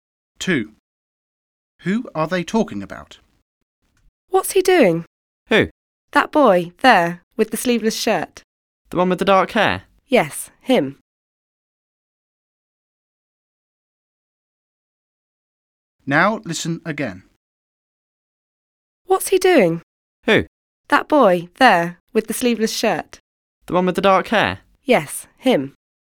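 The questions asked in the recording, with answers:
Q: Who are they talking about?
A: a dark-haired boy in a sleeveless shirt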